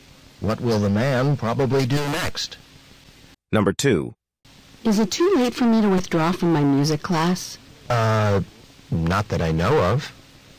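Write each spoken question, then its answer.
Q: What does the man mean?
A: He thinks it is not too late to withdraw from the class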